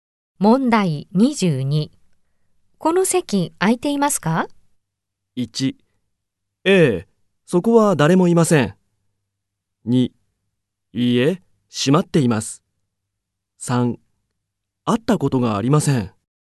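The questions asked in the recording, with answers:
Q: この席空いていますか?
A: 1: ええ、そこは誰もいません。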